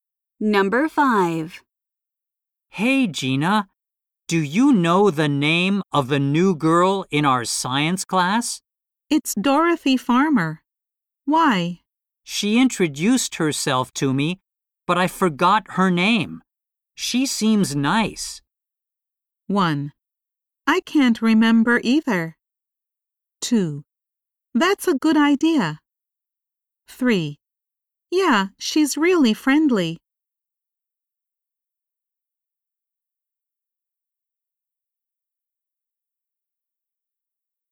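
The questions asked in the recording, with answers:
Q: She seems nice.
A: 3: Yeah, she's really friendly.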